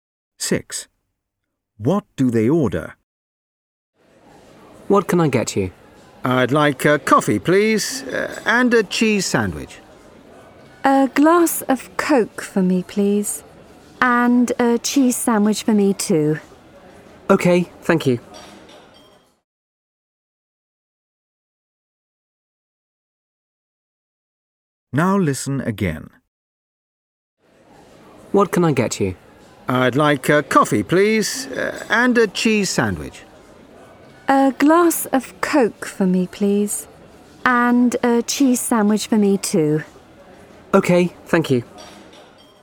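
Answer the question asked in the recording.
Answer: A coffee, a Coke and two cheese sandwiches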